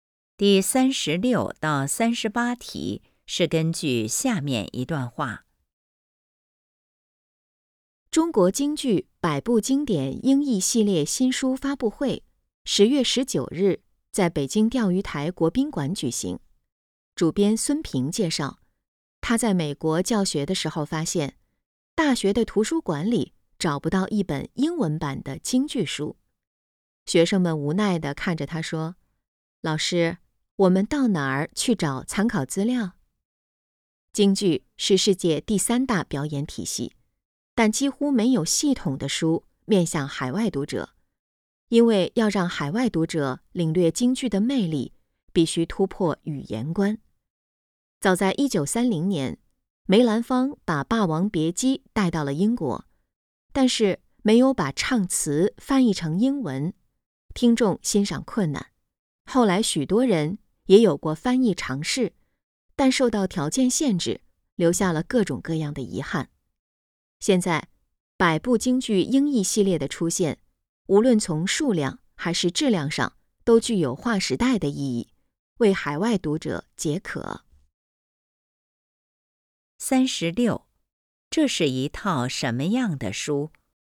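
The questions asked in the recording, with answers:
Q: 这是一套什么样的书?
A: 京剧经典英译系列

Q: 为什么在海外很难找到京剧的资料?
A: 语言障碍,缺少英文版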